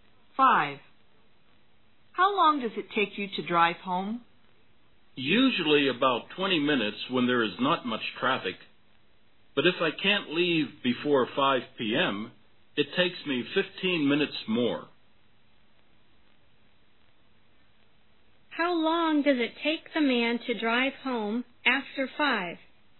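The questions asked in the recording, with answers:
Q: How long does it take the man to drive home after 5?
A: About 35 minutes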